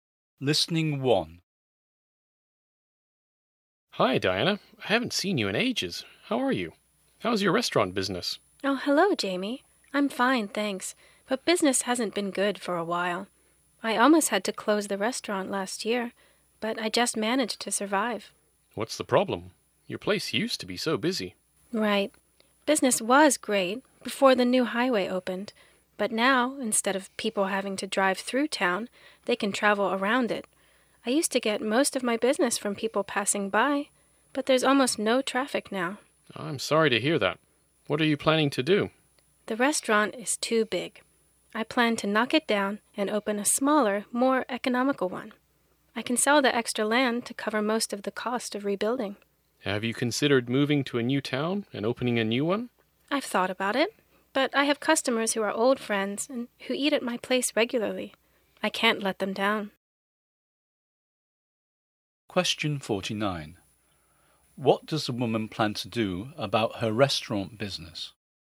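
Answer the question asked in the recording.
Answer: Knock down the restaurant and open a smaller, more economical one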